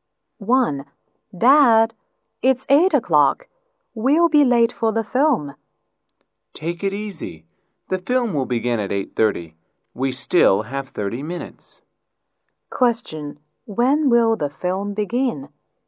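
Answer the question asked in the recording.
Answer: At 8:30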